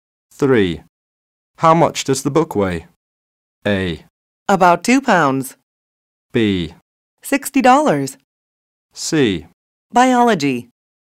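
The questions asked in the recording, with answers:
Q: How much does the book weigh?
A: A: About 2 pounds.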